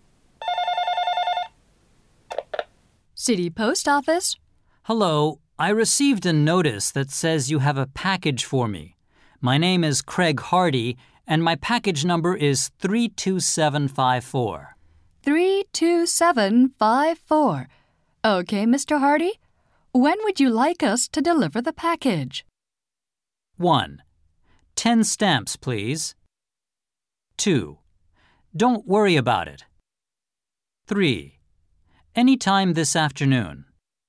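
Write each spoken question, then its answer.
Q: When would you like us to deliver the package?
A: 3: Anytime this afternoon.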